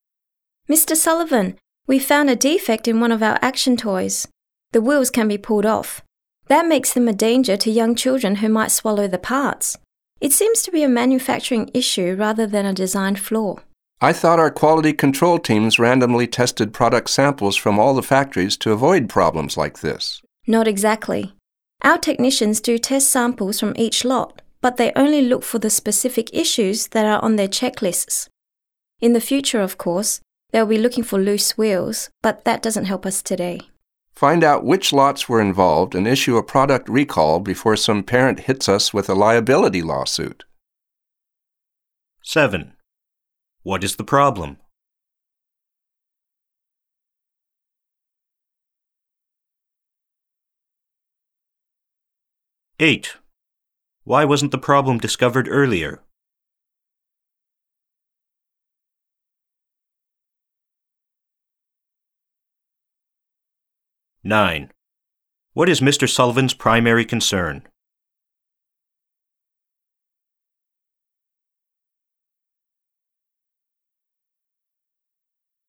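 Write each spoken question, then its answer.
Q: What is the problem?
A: The toy's wheels can be pulled off, so children might swallow them

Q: Why wasn't the problem discovered earlier?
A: Technicians only check for issues on their checklists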